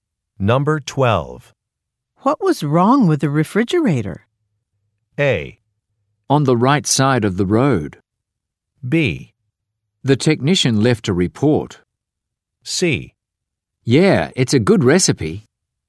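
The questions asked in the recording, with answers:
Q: What was wrong with the refrigerator?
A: B: The technician left a report.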